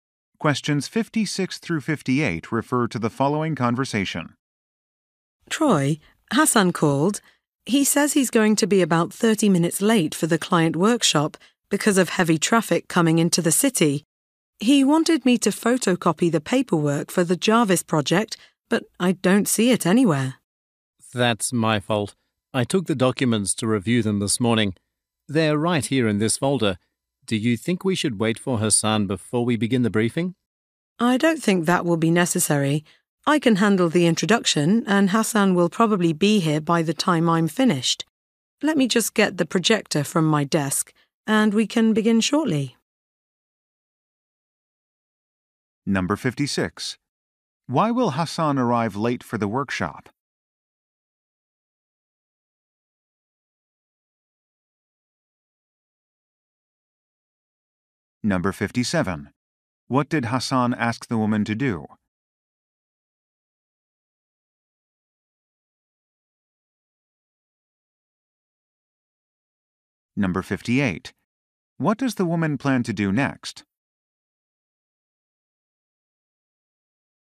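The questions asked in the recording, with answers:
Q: Why will Hassan arrive late for the workshop?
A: Heavy traffic

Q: What did Hassan ask the woman to do?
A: Photocopy the Jarvis project paperwork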